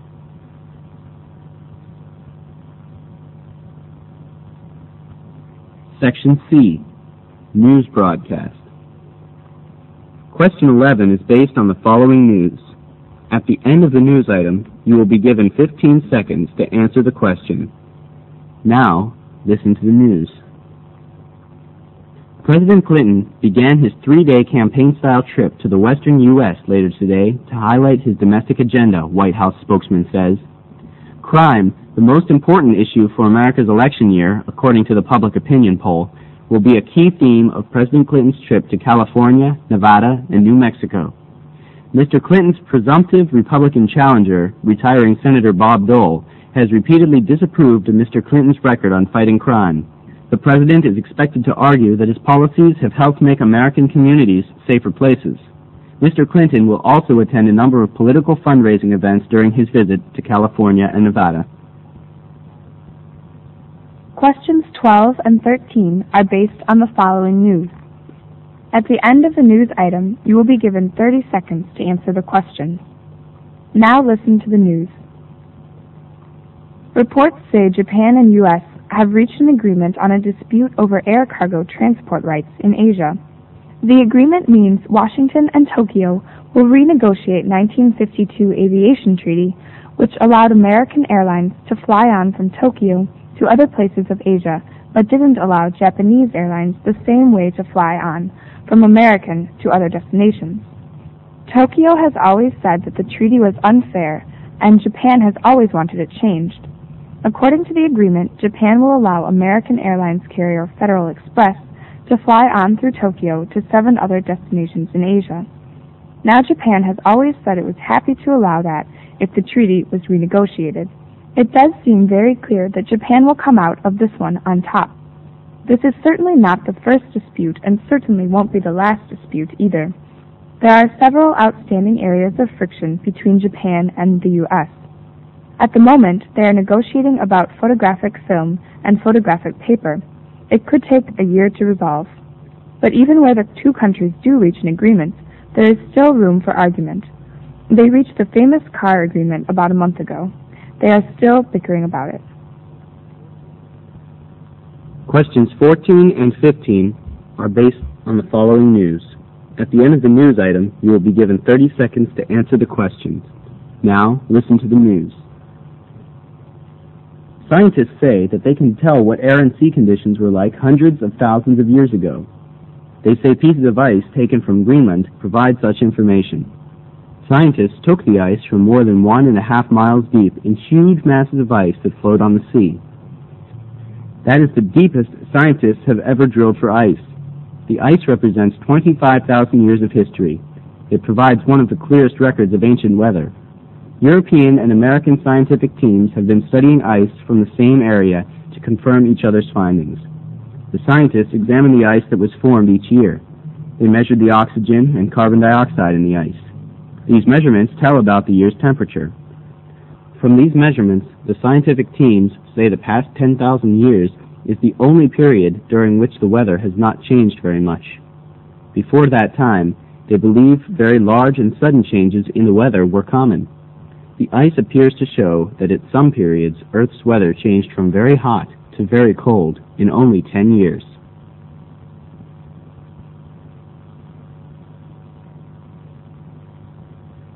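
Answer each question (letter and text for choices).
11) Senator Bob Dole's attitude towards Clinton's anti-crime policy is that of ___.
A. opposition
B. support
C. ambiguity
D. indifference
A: A. opposition

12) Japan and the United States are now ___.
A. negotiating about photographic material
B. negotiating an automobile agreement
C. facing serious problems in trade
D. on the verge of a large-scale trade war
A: A. negotiating about photographic material

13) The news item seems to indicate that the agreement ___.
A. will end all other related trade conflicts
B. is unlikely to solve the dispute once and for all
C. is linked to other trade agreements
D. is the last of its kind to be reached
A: B. is unlikely to solve the dispute once and for all

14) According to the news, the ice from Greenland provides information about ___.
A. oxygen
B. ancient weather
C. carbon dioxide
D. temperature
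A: B. ancient weather

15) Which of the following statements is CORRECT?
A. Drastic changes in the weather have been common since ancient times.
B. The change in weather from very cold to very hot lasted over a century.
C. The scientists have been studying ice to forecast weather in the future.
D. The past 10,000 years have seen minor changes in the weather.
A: D. The past 10,000 years have seen minor changes in the weather.

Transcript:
White House spokesman says crime, the most important issue for Americans t his election year according to public opinion polls, will be a key theme of President Clinton's trips to California, Nevada and New Mexico. Mr. Clinton's presumptive Republican challenger, retiring Senator Bob Dole, has repeatedly disapproved of Mr. Clinton's record on fighting crime. The president is expected to argue that his policies have helped make American communities safer places. 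Mr. Clint on will also attend a number of political fund-raising events during his visits to California and Nevada.
News Item 2(For Questions 12-13)
Reports say Japan and the US have reached an agreement on their dispute over air-cargo transport rights in Asia.
The agreement will mean that Washington and Tokyo will renegotiate a 1952 Aviation Treaty which allowed American airlines to fly on from Tokyo to other pl aces in Asia but didn't allow Japanese airlines the same rights to fly on from America to other destinations. Tokyo has always said that the treaty was unfair and Japan has always wanted it changed.
According to the agreement, Japan will allow the American airline carrier Federal Express to fly on through Tokyo to 7 other destinations in Asia. Now Japan has always said it was happy to allow that, if the treaty was renegotiated. It does seem very clear that Japan has come out of this one on top.
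This is certainly not the first dispute and it certainly won't be the last dispute, either. There are several outstanding areas of friction between Japan and the US. At the moment, they are negotiating about photographic film and photographic paper. It could take a year to resolve. But even where the two countries do reach agreement there is still room for argument. They reached this famous car agreement about a month ago. They are already bickering about it.
News Item 3(For Questions 14-15)
Scientists say they can tell what air and sea conditions were like hundreds of thousands of years ago. They say pieces of ice taken from Greenland provide such information.
Scientists took the ice from more than one-and-a-half mile deep in huge masses of ice that float on the sea. That is the deepest scientists ever have drilled for ice. The ice represents 25,000 years of history. It provides one of the clearest records of ancient weather. 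European and American scientific teams have been studying ice from the same area to confirm each other s findings. The scientists examine the ice that was formed each year. They measure the oxygen and carbon dioxide in the ice. These measurements tell about the year's temperature.
From these measurements, the scientific teams say that the past 10,000 years is the only period during which the weather has not changed very much. Before that time, they believe very large, sudden changes in the weather were common. The ice appears to show that at some periods, earth's weather changed from very hot to very cold in only ten years.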